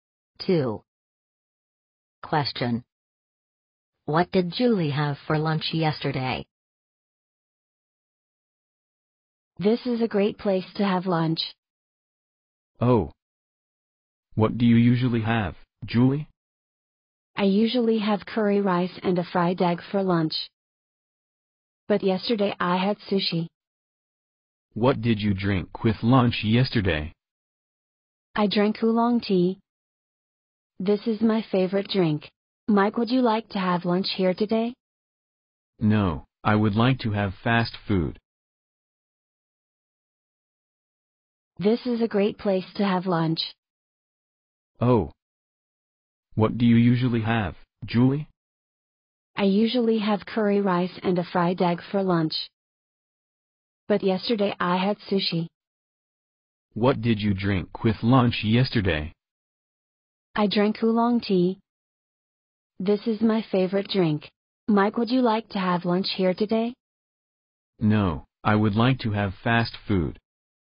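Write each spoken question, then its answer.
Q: What did Julie have for lunch yesterday?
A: Sushi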